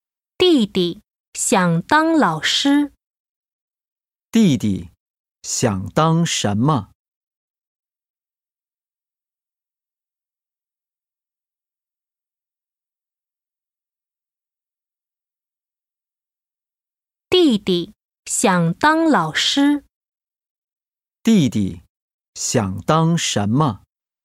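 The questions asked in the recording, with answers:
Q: 弟弟想当什么?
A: 老师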